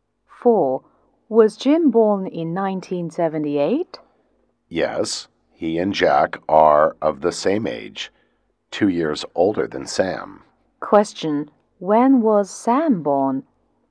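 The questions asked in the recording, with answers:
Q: When was Sam born?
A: In 1980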